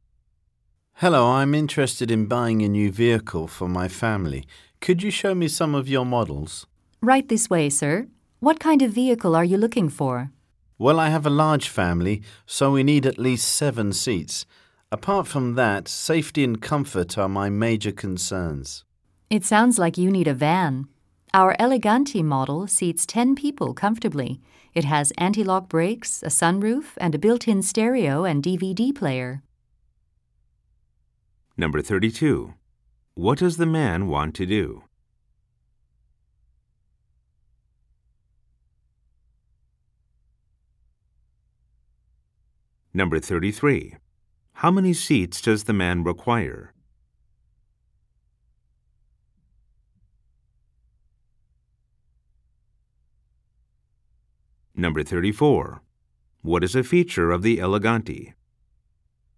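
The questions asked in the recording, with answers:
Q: What does the man want to do?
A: Buy a new vehicle for his family

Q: How many seats does the man require?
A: At least 7

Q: What is a feature of the Eleganti?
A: Anti-lock brakes, a sunroof, and a built-in stereo and DVD player; it seats 10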